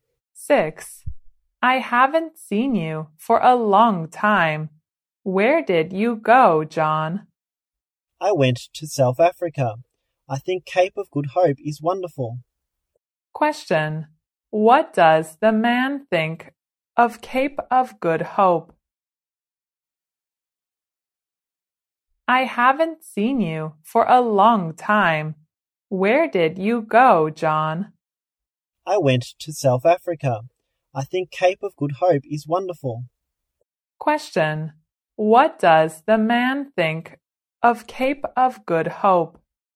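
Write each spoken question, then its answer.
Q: What does the man think of Cape of Good Hope?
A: It is wonderful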